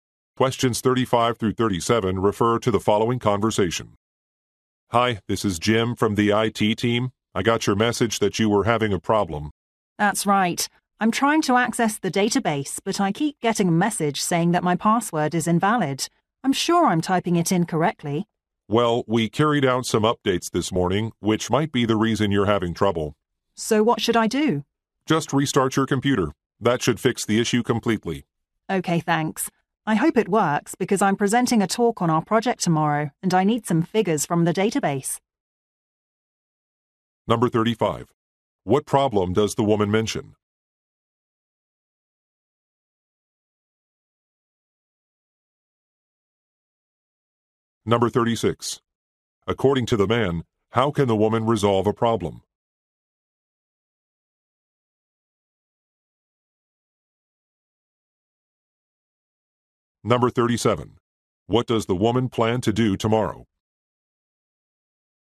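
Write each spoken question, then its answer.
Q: What problem does the woman mention?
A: She can't access the database because her password is shown as invalid

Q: According to the man, how can the woman resolve a problem?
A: By restarting her computer

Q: What does the woman plan to do tomorrow?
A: Give a talk on her project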